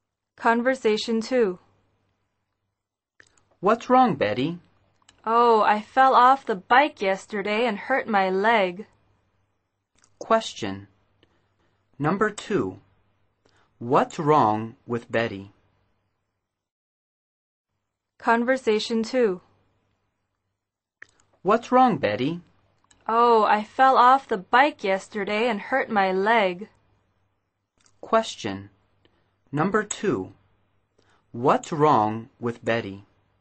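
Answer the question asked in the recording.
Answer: She fell off the bike and hurt her leg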